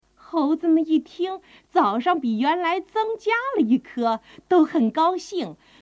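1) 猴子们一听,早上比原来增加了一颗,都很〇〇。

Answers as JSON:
{"1": "高兴 gāoxìng"}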